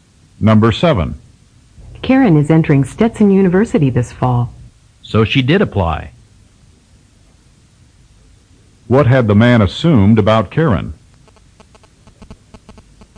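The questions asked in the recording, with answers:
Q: What had the man assumed about Karen?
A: That she had not applied to Stetson University.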